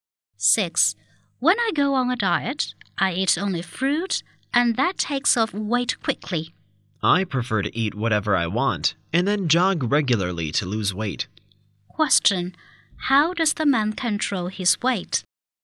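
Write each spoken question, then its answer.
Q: How does the man control his weight?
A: By jogging regularly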